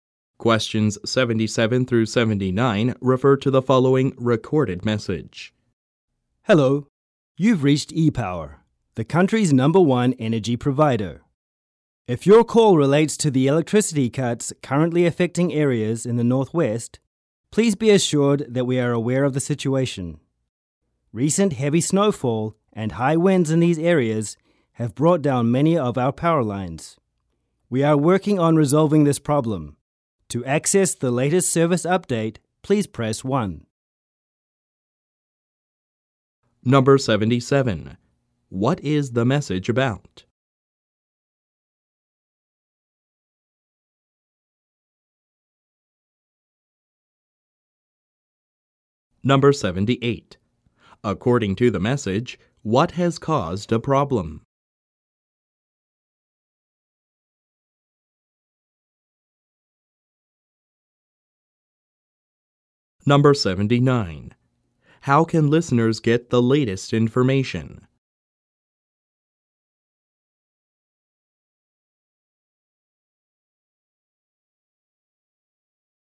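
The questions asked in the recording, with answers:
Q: What is the message about?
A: Electricity cuts (a power outage) in the Northwest

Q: According to the message, what has caused a problem?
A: Heavy snowfall and high winds bringing down power lines

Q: How can listeners get the latest information?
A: By pressing 1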